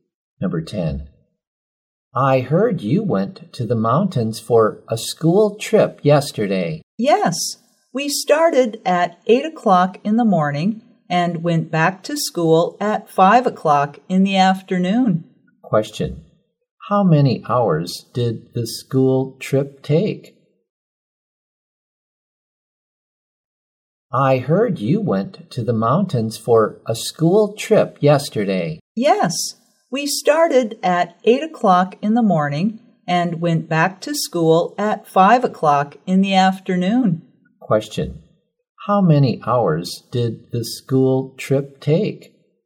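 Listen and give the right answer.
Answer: Nine hours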